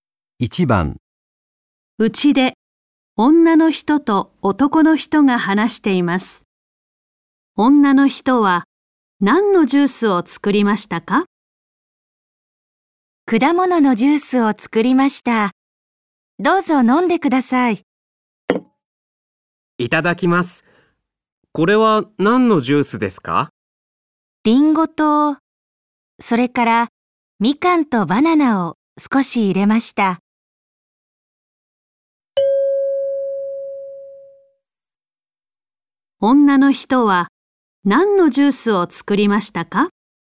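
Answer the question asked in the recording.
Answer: リンゴとみかんとバナナのジュース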